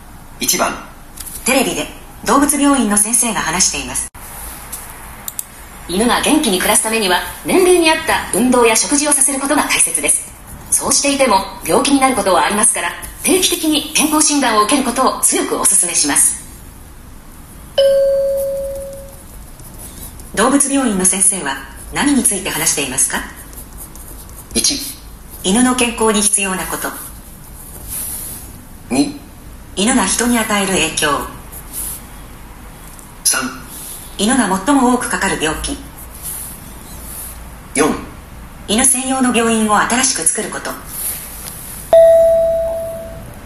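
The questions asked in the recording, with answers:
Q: 動物病院の先生は何について話していますか?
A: 1: 犬の健康に必要なこと。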